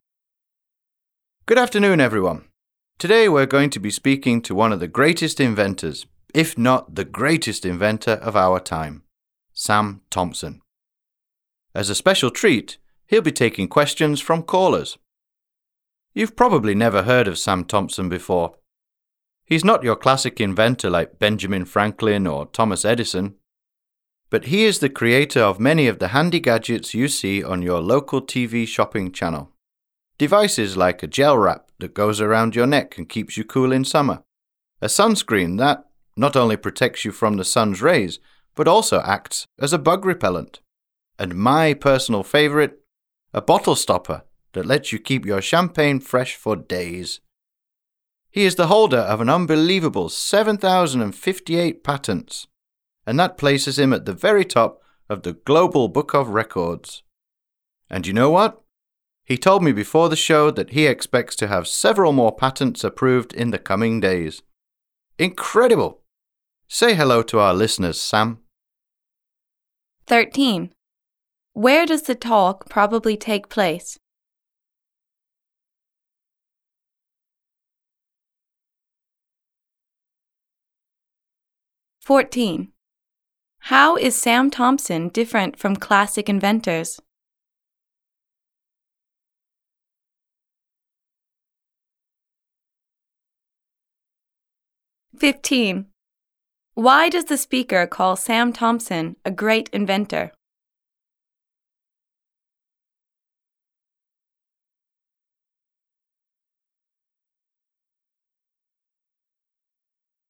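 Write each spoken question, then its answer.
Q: Where does the talk probably take place?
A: On a radio show

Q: How is Sam Thompson different from classic inventors?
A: He creates handy gadgets sold on TV shopping channels

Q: Why does the speaker call Sam Thompson a great inventor?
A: He holds 7,058 patents, the most in the world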